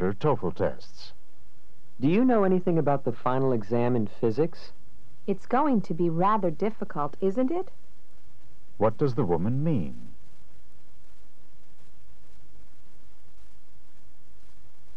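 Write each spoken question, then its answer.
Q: What does the woman mean?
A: She thinks the exam will be difficult but isn't sure.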